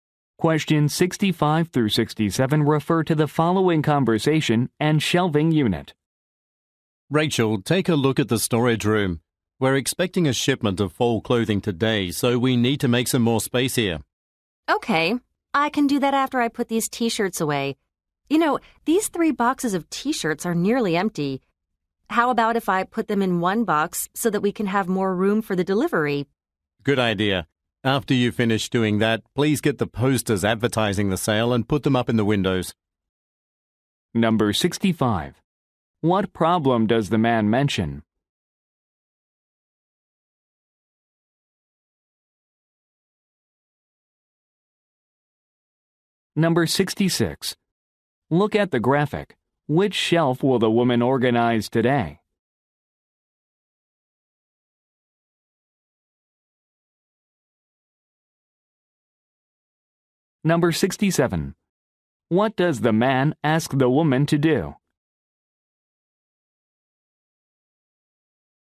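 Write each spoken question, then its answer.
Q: What problem does the man mention?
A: More space is needed for a shipment

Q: What does the man ask the woman to do?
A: Put up sale posters in the windows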